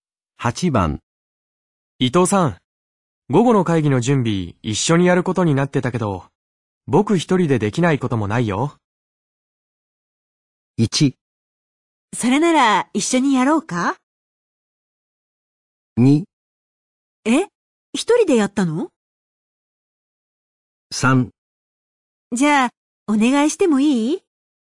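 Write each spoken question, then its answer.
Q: 伊藤さん、午後の会議の準備一緒にやることになってたけど、僕一人でできないこともないよ。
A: 3: じゃあ、お願いしてもいい?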